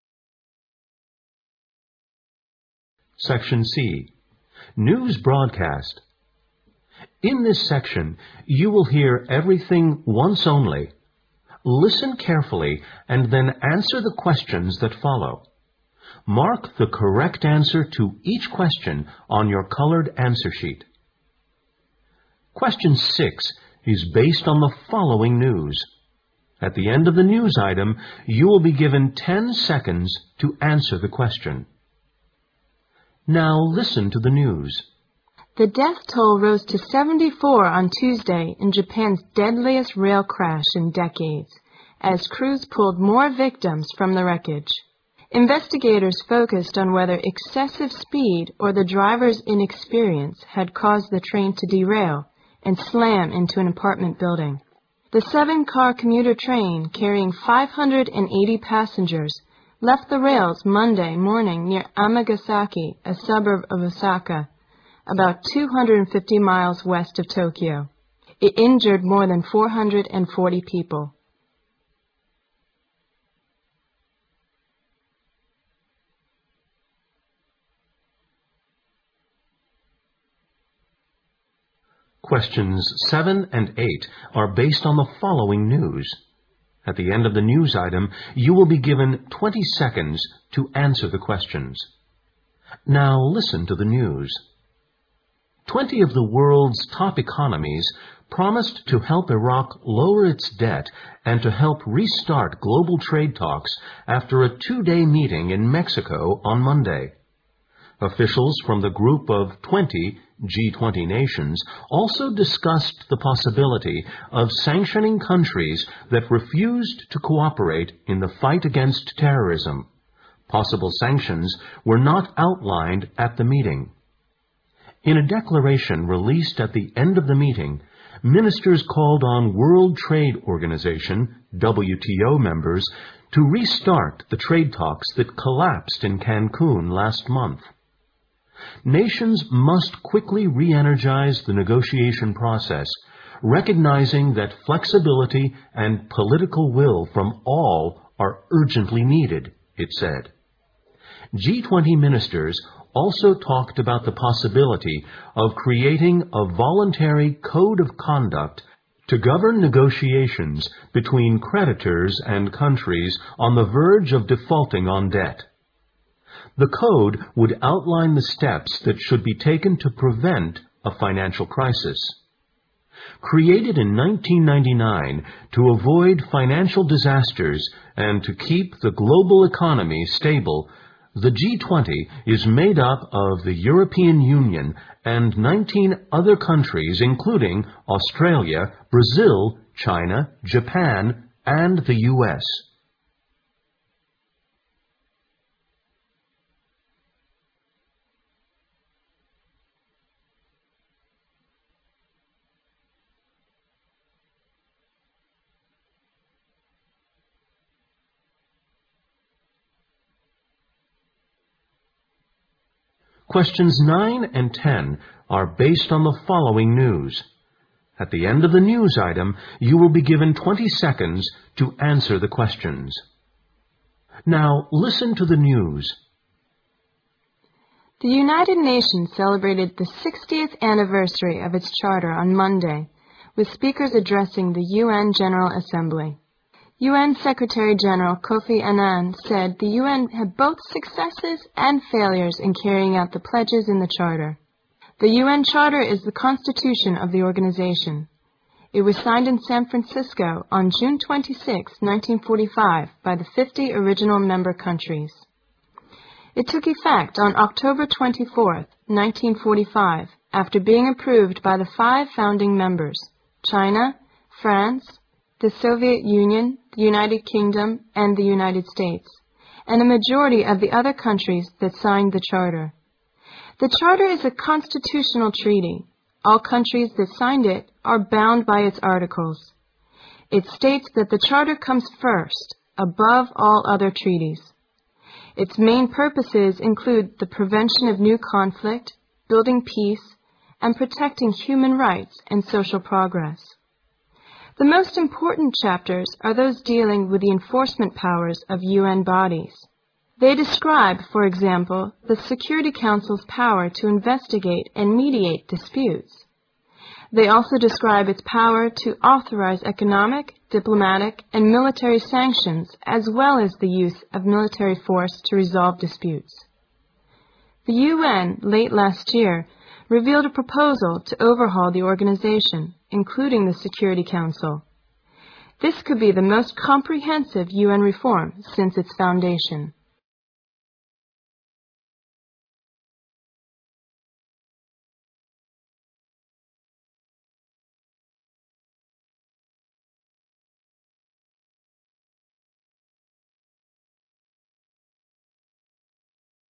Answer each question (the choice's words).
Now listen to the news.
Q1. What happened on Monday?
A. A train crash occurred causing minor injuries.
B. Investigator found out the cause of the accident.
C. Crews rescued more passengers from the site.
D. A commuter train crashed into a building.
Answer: A commuter train crashed into a building.

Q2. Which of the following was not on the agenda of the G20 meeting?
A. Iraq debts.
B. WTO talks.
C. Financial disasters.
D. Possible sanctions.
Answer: Financial disasters.

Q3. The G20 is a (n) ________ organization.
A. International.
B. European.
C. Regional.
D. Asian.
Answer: International.

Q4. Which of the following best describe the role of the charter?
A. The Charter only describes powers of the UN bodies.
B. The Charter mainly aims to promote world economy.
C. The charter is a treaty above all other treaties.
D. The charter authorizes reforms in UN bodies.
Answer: The charter is a treaty above all other treaties.

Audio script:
The death toll rose to 74 on Tuesday in Japan's deadliest rail crash in decades, as crews pulled more victims from the wreckage. Investigators focused on whether excessive speed or the driver's in?experience had caused the train to derail and slam into an apartment building. ( Q6) The seven-cart commuter train carrying 580 passengers left the rails Monday morning near Amagasaki, a suburb of Osaka, about 250 miles west of Tokyo. It injured more than 440 people.
News Item 2(for questions 7-8)
Twenty of the world's top economies promised to help Iraq lower its debt and to help restart glob?al trade talks after a two-day meeting in Mexico on Monday. Officials from the group of Twenty, G20 Nations also discussed the possibility of sanctioning countries that refused to cooperate in the fight a?gainst terrorism. ( Q7 ) Possible sanctions were not outlined at the meeting. In a declaration released at the end of the meeting, ministers called on World Trade Organization, WTO , members to restart the trade talks that collapsed in Kankong last month. Nations must quickly reenergize the negotiation process , recognizing that flexibility and political will from all are urgently needed , it said. G20 min?isters also talked about the possibility of creating a voluntary code of conduct to govern negotiations between creditors and countries on the verge of defaulting on debt. The code would outline the steps that should be taken to prevent a financial crisis. Created in 1999 to avoid financial .disasters and to keep the global economy stable , the G20 is made up of the European Union and 19 other countries , including Australia, Brazil, China, Japan and the US.
News Item 3(for questions 9-10)
The United Nations celebrated the 60th anniversary of its Charter on Monday with speakers ad?dressing the UN General Assembly. UN Secretary General Kofi Annan said the UN had both succes?ses and failures in carrying out the pledges in the Charter. The UN Charter is the Constitution of the organization. It was signed in San Francisco on June 26th, 1945 by the 50 original member coun?tries. It took effect on October 24th , 1945 after being approved by the five founding members : Chi?na, France, the Soviet Union, the United Kingdom and the United States. ( Q9 ) And the majority of the other countries did -sign the Charter. The Charter is a constitutional treaty. All countries that signed it are hound by 'its articles. It states that the Charter comes first above all other treaties. ( Q10) Its main purposes include the prevention of new conflict, building peace and protecting hu?man rights and social progress. The most important chapters are those dealing with the enforcement powers of UN bodies. They describe, for example, the Security Council's power to investigate and mediate disputes. They also describe its power to authorize economic, diplomatic and military sanc?tions as well as the use of military force to resolve disputes: The UN late last year revealed the pro?posal to overhaul the organization including the Security Council. This could be the most comprehen?sive UN reform since its foundation.